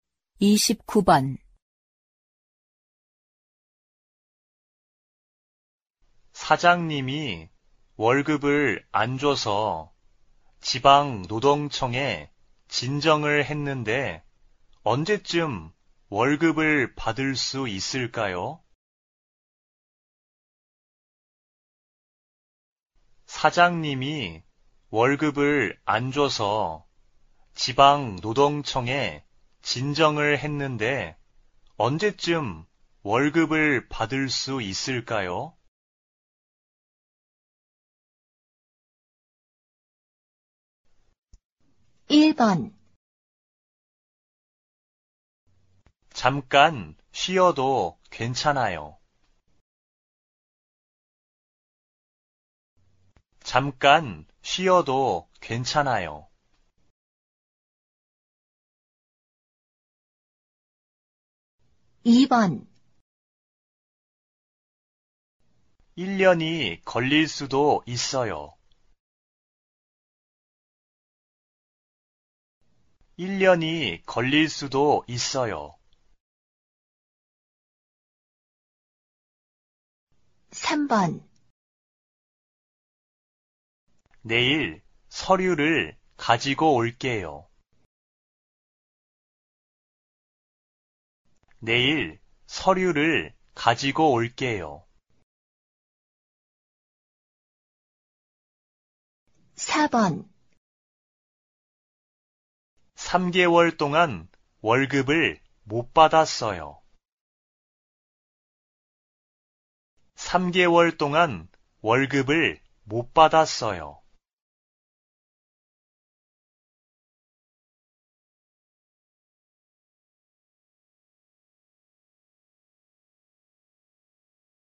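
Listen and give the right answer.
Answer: 2: 1년이 걸릴 수도 있어요.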